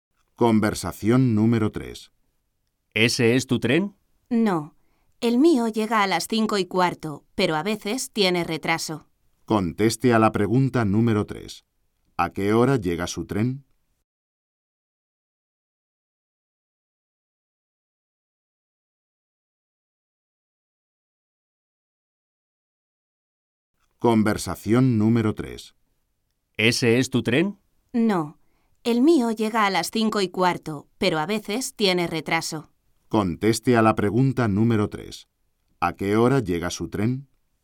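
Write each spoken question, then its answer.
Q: ¿A qué hora llega su tren?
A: A las 5:15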